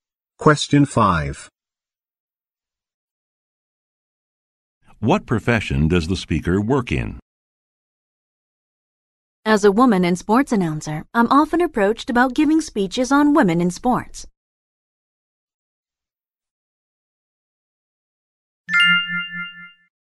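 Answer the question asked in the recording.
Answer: Sports announcer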